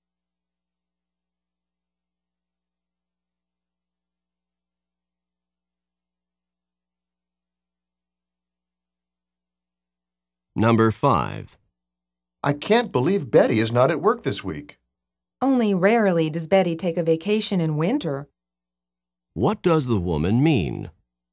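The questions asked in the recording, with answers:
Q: What does the woman mean?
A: Betty doesn't usually take winter vacations.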